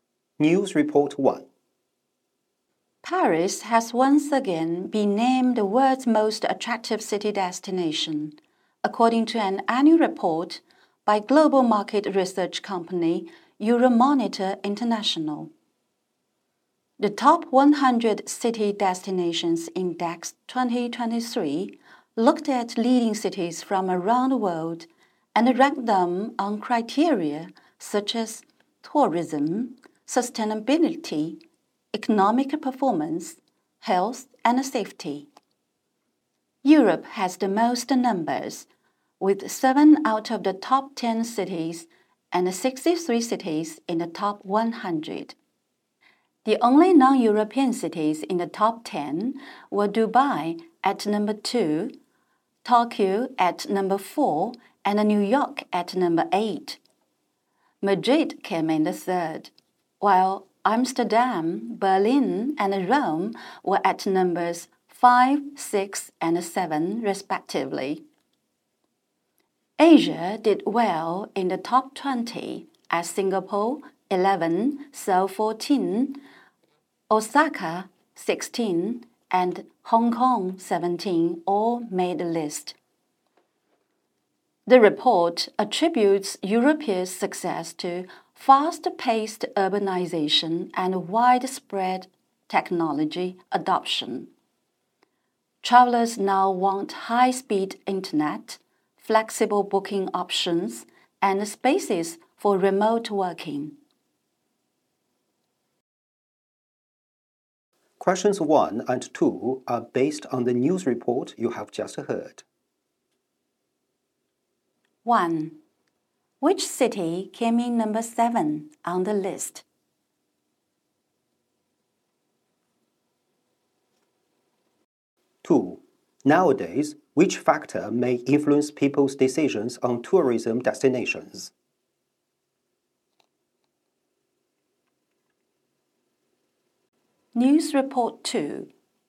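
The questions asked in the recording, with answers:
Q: Which city came in number 7 on the list?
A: Rome

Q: Nowadays, which factor may influence people's decisions on tourism destinations?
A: High-speed internet, flexible booking options and spaces for remote working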